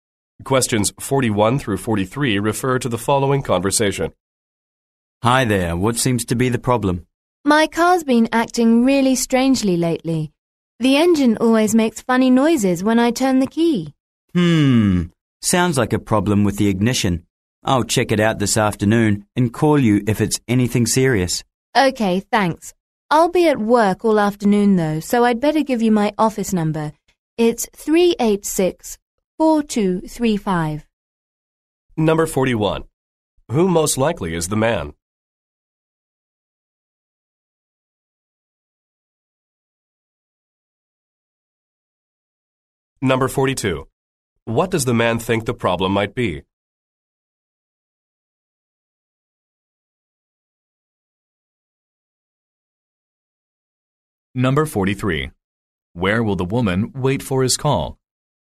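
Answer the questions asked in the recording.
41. A car mechanic
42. The ignition
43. At work (her office)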